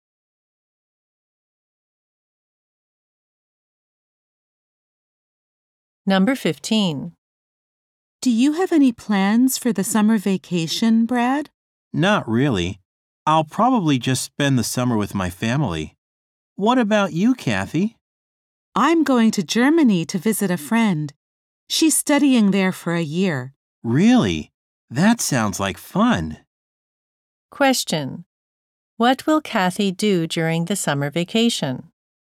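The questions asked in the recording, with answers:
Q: What will Kathy do during the summer vacation?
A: Visit a friend in Germany.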